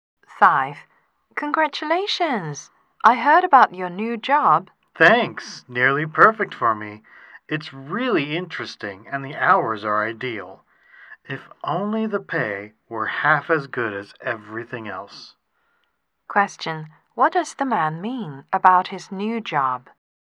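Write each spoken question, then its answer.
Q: What does the man mean about his new job?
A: The pay is not good enough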